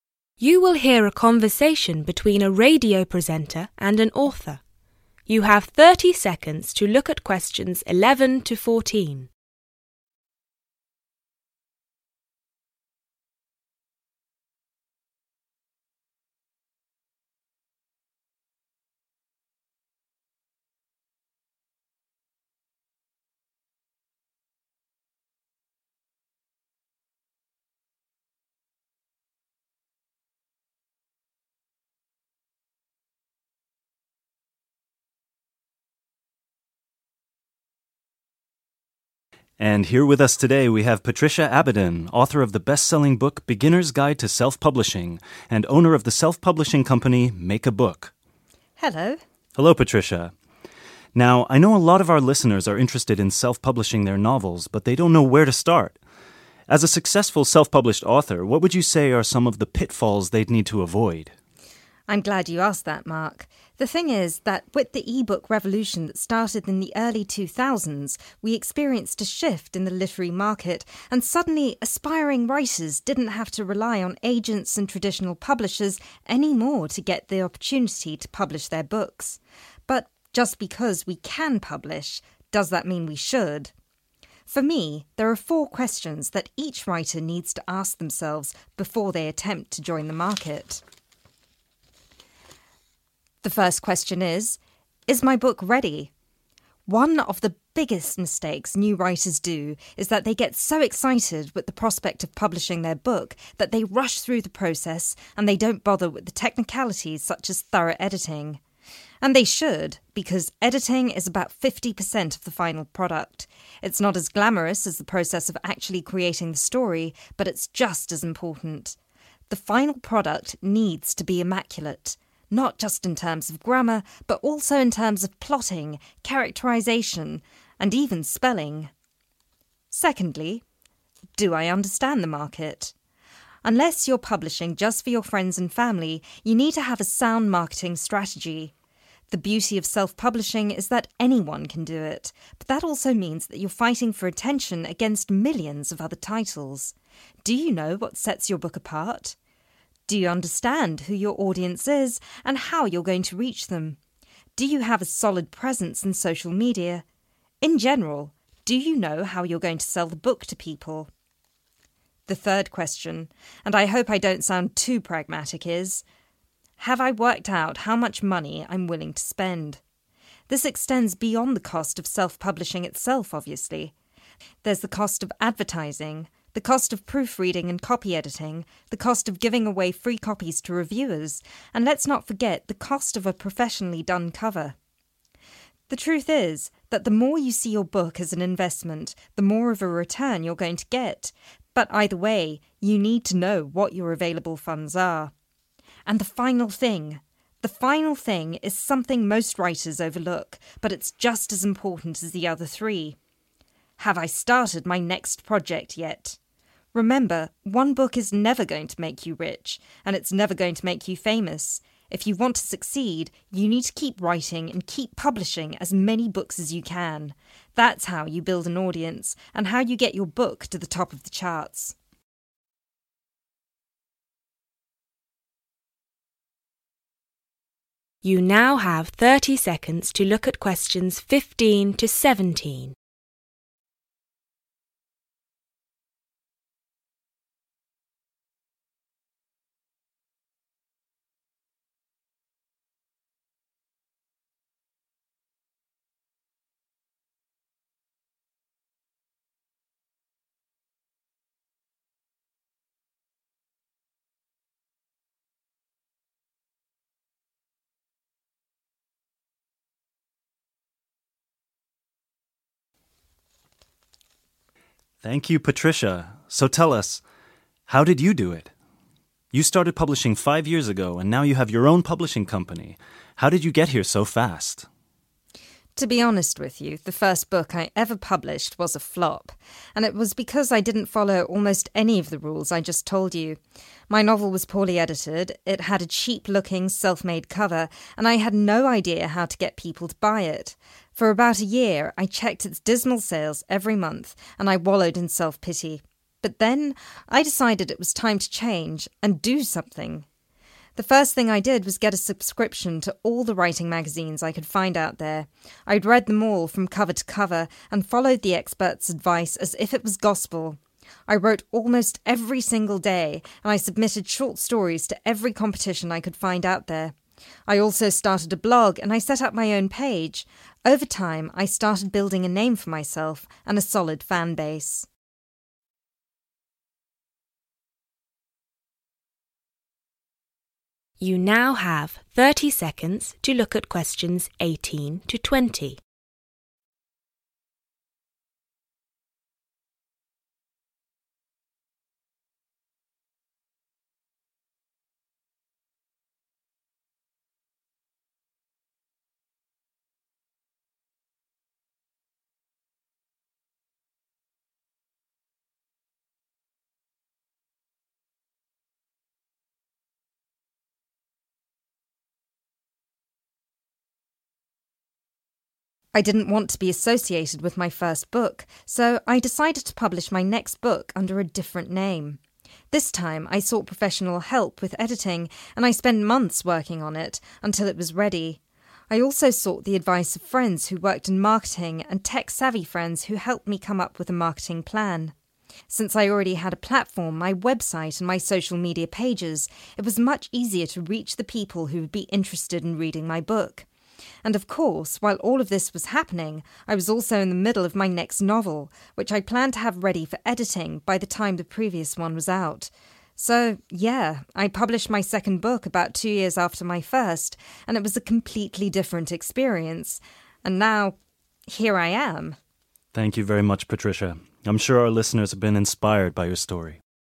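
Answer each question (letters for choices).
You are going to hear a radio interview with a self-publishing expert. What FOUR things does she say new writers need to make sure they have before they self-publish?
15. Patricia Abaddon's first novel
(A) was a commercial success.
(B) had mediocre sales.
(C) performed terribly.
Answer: C

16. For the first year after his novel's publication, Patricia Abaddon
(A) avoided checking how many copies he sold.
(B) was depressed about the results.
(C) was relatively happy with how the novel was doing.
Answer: B

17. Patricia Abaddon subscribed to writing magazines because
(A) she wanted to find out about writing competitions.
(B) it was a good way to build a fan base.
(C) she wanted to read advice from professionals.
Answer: C

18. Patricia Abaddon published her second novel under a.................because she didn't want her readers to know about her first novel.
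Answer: different name

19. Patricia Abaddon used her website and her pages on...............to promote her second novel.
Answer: social media

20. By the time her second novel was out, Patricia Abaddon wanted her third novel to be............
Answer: ready for editing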